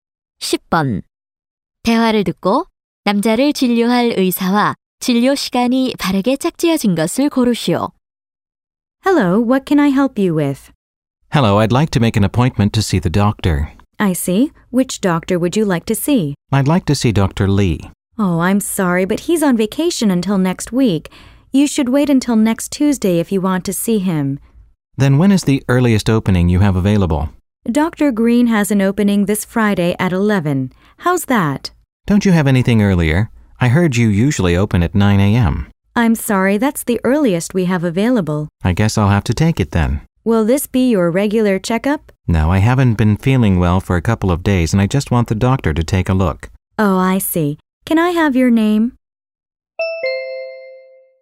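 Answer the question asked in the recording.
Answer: Dr. Green, 이번 금요일 11시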